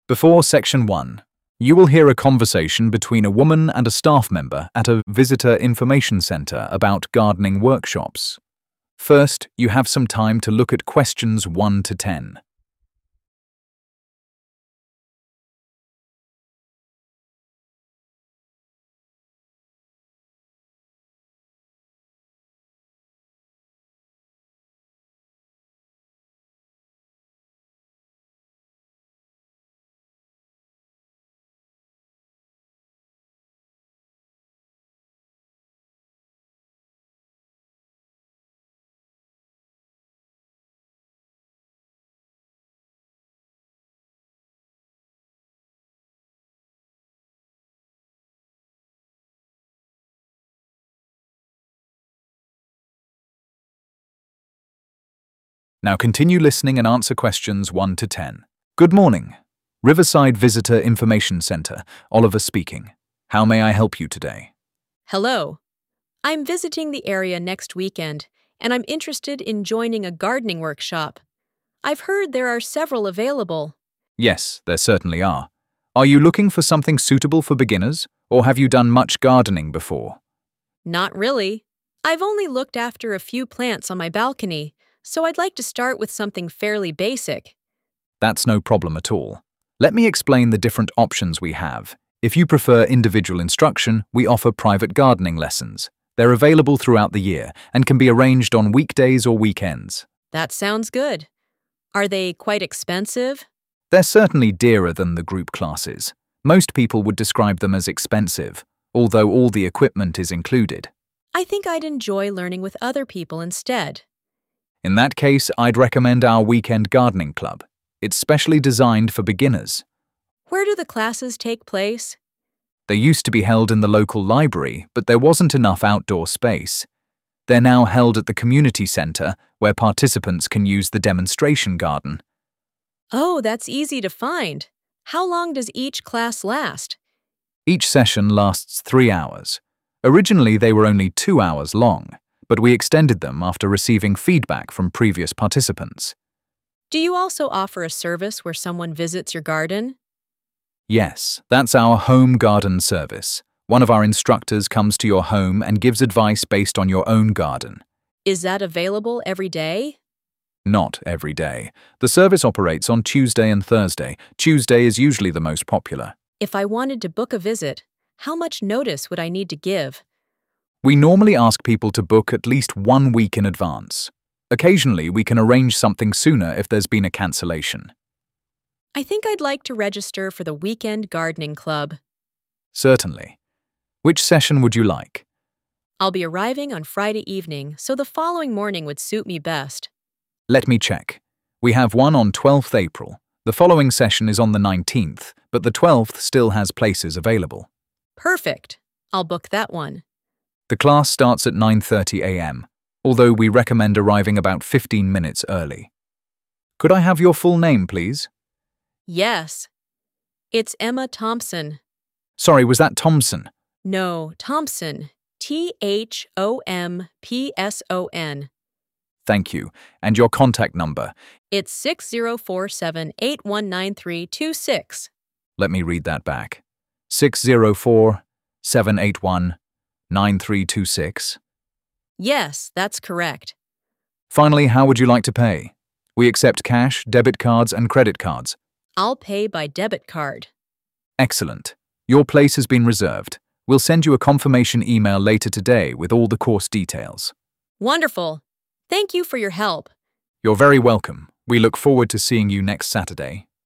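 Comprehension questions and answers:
Complete the notes below. Write ONE WORD AND/OR A NUMBER for each answer.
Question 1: Cost is considered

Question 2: Classes are held at the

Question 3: Each session lasts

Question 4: Available every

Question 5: Bookings should be made at least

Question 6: Date:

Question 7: Starting Time:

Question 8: Participant's Surname: Emma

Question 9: Contact Number:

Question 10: Payment Method:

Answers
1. expensive
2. community center
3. 3 hours
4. Tuesday and Thursday
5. 1 week
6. 12th April
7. 9:30
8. Thompson
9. 604-781-9326
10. debit card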